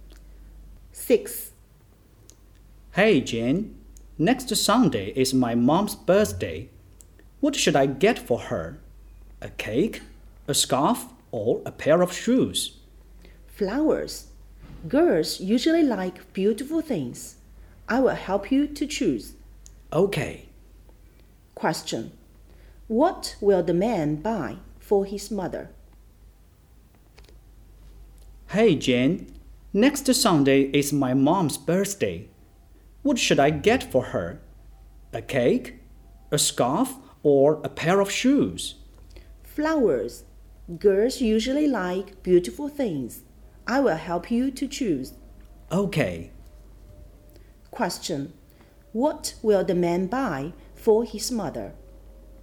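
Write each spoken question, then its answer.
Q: What will the man buy for his mother?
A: Flowers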